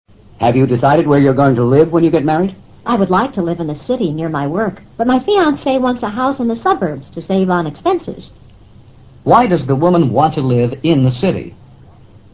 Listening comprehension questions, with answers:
Why does the woman want to live in the city?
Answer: Her job is in the city.